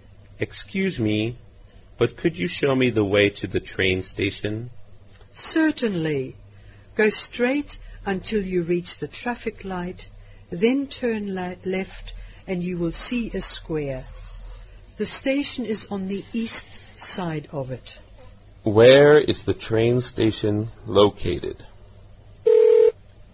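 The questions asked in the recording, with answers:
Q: Where is the train station located?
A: On the east side of the square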